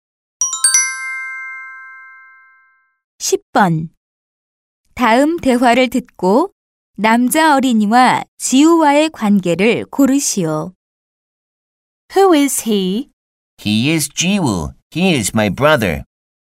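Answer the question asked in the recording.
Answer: 형제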